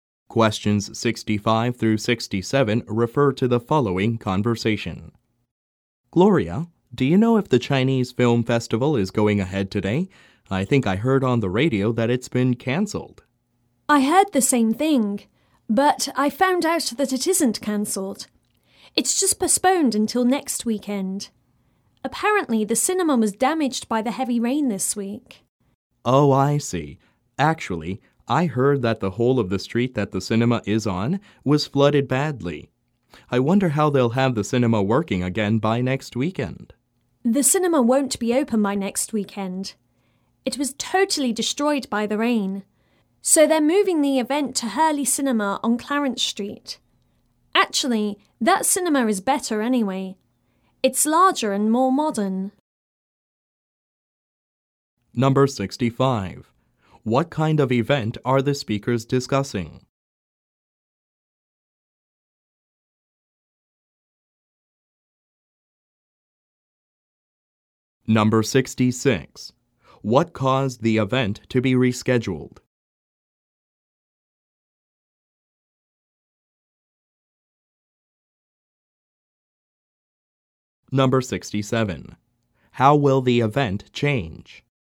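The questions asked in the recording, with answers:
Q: What kind of event are the speakers discussing?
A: A film festival

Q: What caused the event to be rescheduled?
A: Heavy rain damaged the cinema

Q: How will the event change?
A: It will move to Hurley Cinema on Clarence Street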